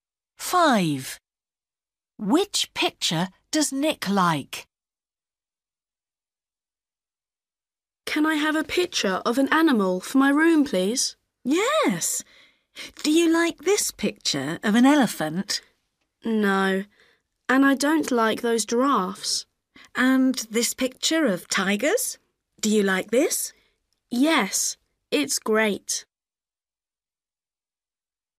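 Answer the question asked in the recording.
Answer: the picture of tigers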